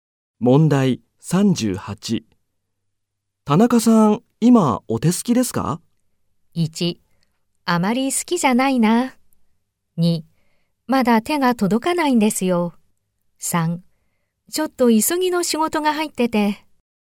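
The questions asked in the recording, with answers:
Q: 田中さん、今お手すきですか?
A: 3: ちょっと急ぎの仕事が入ってて。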